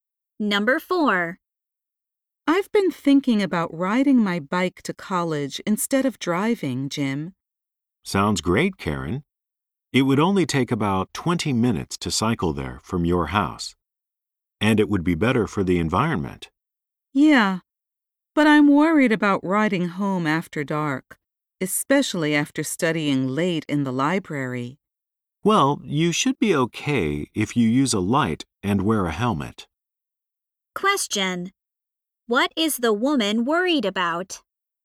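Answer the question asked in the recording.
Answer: Riding her bike home after dark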